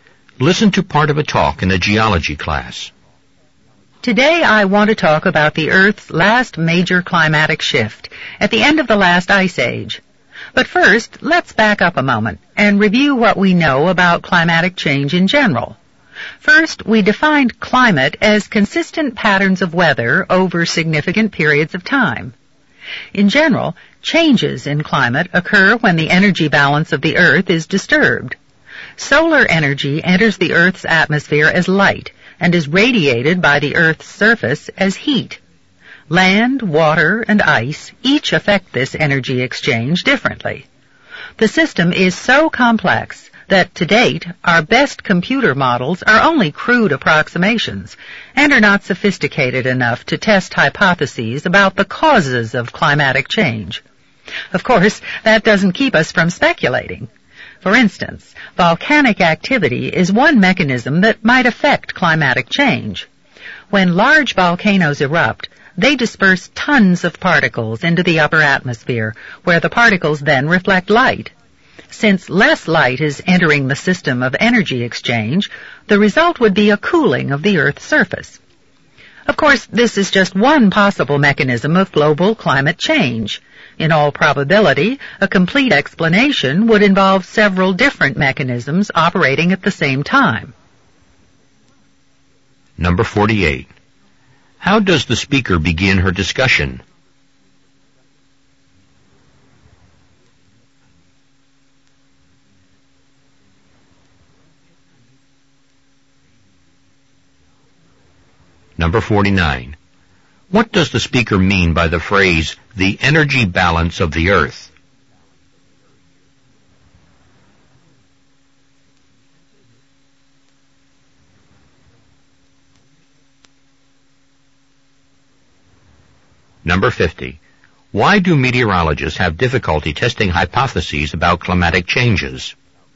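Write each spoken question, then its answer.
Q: How does the speaker begin her discussion?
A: By reviewing what is known about climatic change in general

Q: What does the speaker mean by the phrase, the energy balance of the Earth?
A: The exchange between solar energy entering as light and heat radiated by the Earth's surface

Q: Why do meteorologists have difficulty testing hypotheses about climatic changes?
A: The system is too complex; computer models are only crude approximations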